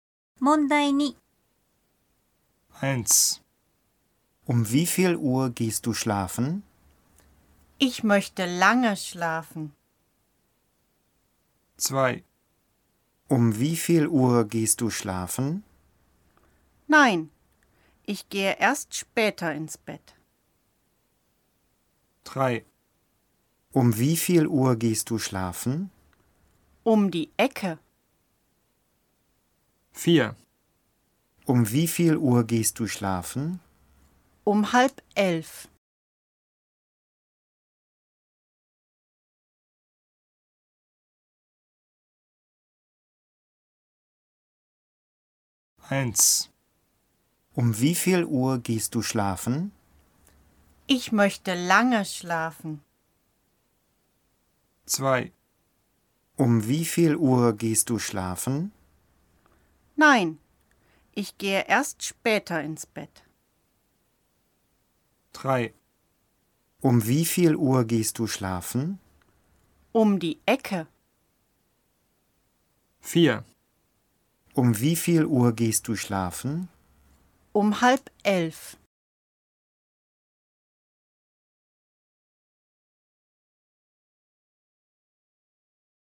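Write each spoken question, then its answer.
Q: Um wie viel Uhr gehst du schlafen?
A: 4: Um 10:30.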